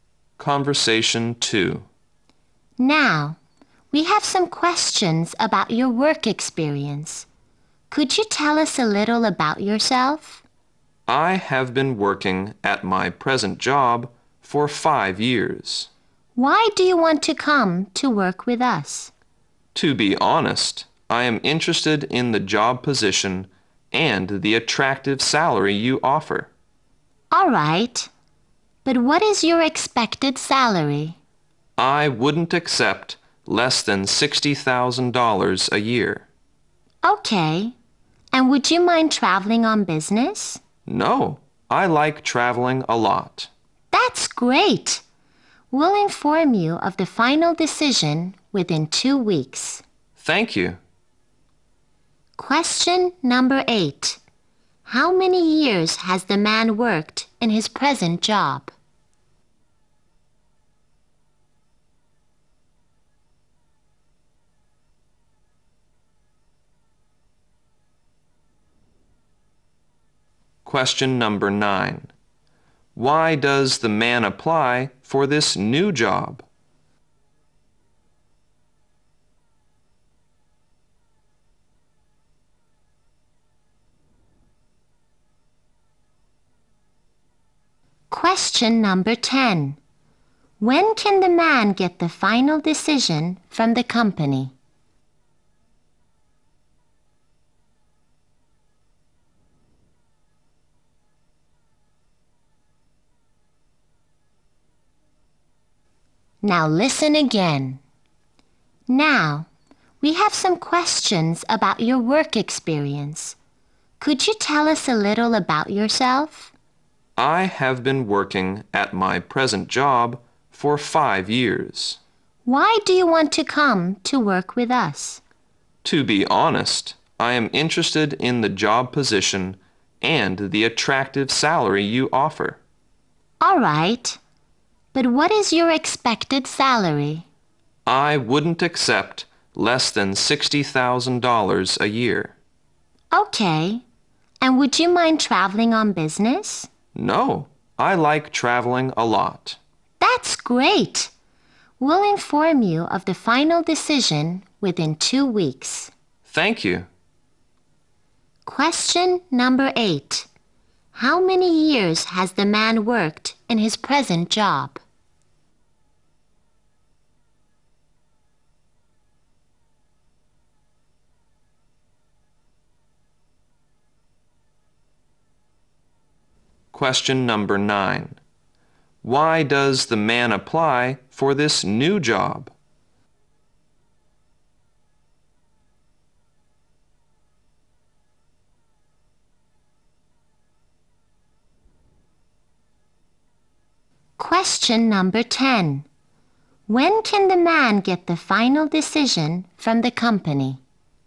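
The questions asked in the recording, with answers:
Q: How many years has the man worked in his present job?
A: 5 years

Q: Why does the man apply for this new job?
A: He is interested in the position and the attractive salary

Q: When can the man get the final decision from the company?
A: Within 2 weeks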